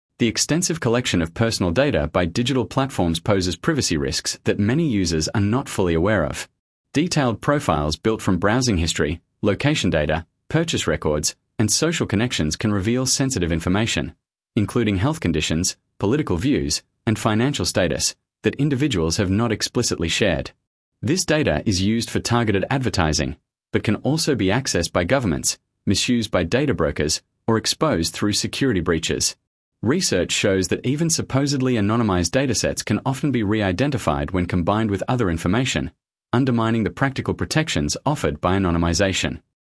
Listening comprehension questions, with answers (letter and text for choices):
Select the paragraph that best summarises the recording.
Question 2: Sample Text 2 — Digital Privacy Risks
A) A. The greatest privacy risk comes from government surveillance programmes that target political dissidents.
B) B. Smartphones and digital platforms collect vast quantities of personal data, creating privacy risks that regulation has so far failed to fully address.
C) C. Consumers are well-informed about privacy risks and make rational choices about the data they share with platforms.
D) D. Encryption technology has made it practically impossible for third parties to access personal data on modern devices.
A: B) B. Smartphones and digital platforms collect vast quantities of personal data, creating privacy risks that regulation has so far failed to fully address.